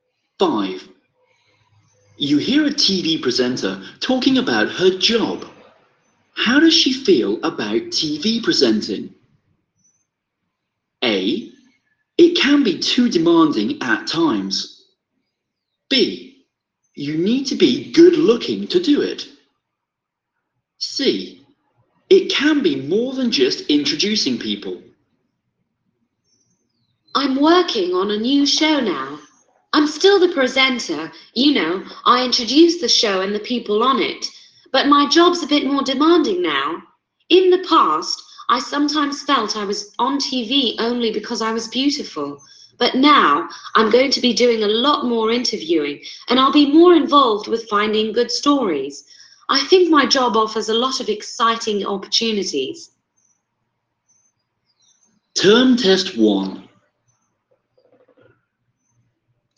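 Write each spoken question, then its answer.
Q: How does she feel about TV presenting?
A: C: It can be more than just introducing people.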